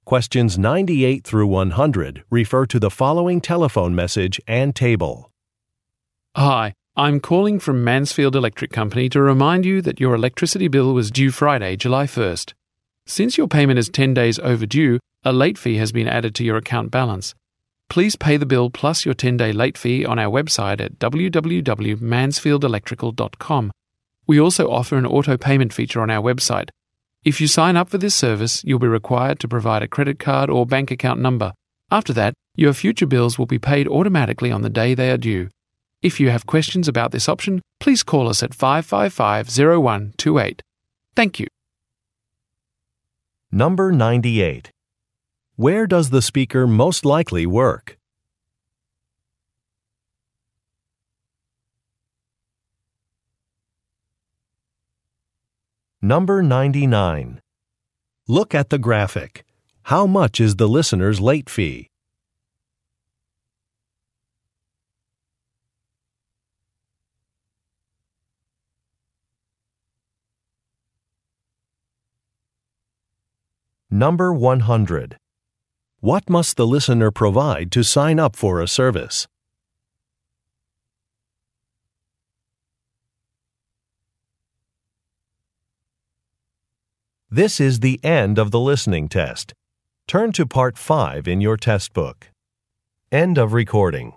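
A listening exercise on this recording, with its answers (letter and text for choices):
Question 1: Where does the speaker most likely work?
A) At a financial institution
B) At a lighting fixture store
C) At a utility company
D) At a library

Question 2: What must the listener provide to sign up for a service?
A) Some contact information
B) Some payment details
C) An invoice number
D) An identification card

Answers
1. C) At a utility company
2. B) Some payment details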